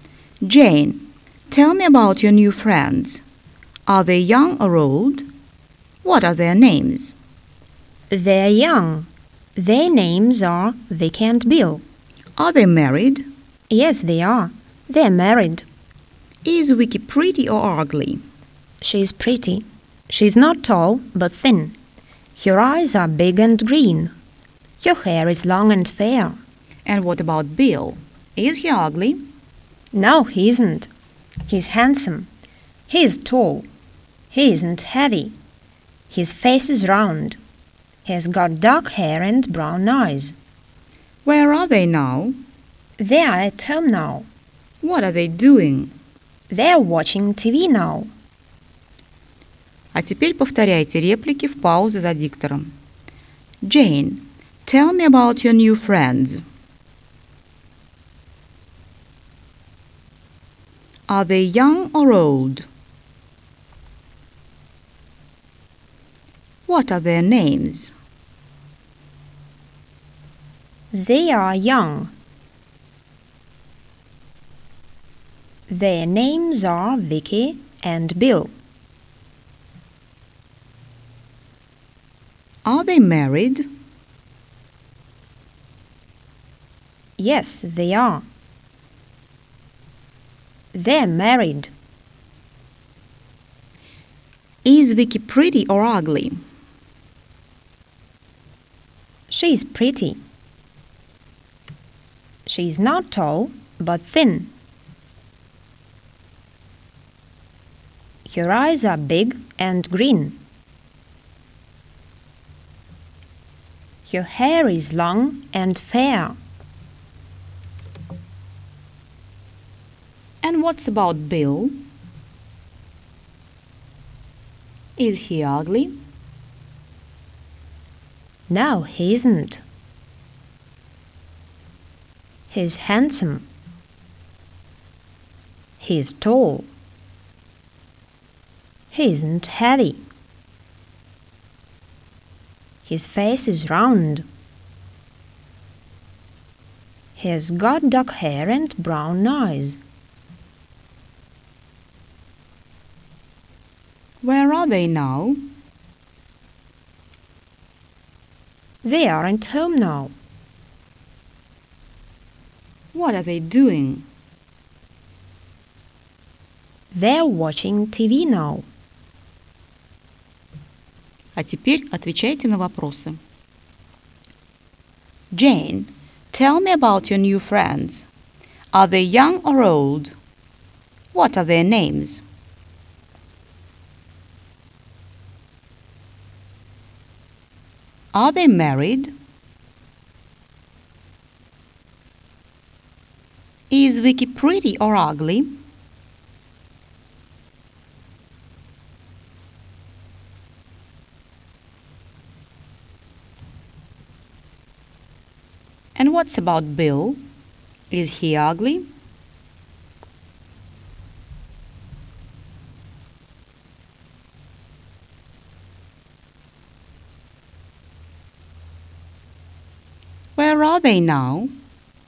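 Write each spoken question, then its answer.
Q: Are they young or old?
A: They're young.

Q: What are their names?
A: Vicky and Bill.

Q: Are they married?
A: Yes, they are.

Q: Is Vicky pretty or ugly?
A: She's pretty.

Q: Is he ugly?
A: No, he isn't. He's handsome.

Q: Where are they now?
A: They are at home.

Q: What are they doing?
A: They're watching TV.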